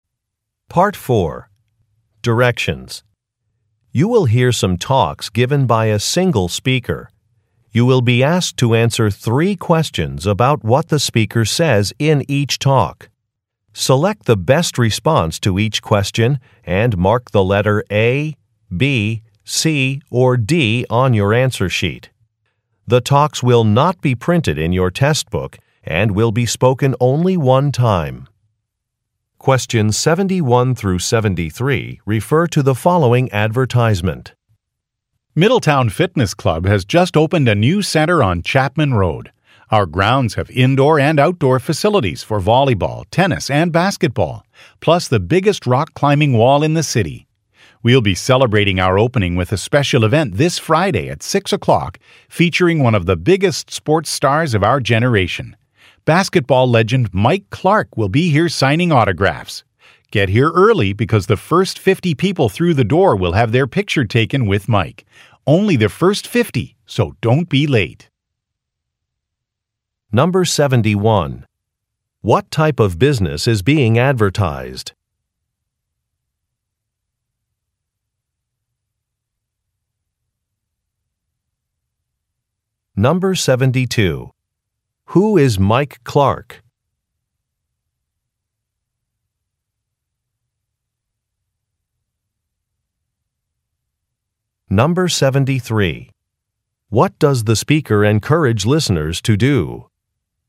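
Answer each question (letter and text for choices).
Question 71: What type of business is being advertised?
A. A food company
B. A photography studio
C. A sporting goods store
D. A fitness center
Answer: D. A fitness center

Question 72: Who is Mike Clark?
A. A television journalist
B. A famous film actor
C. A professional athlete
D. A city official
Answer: C. A professional athlete

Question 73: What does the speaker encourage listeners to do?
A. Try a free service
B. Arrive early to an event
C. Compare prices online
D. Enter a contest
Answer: B. Arrive early to an event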